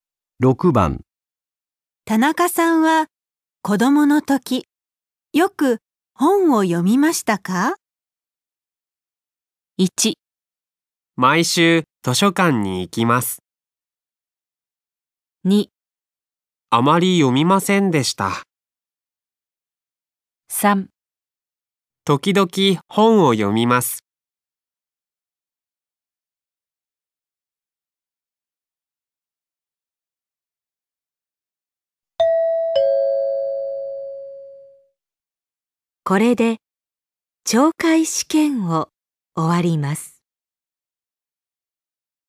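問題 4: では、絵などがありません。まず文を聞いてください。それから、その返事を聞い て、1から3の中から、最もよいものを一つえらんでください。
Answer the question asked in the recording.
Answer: あまり読みませんでした。

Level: N5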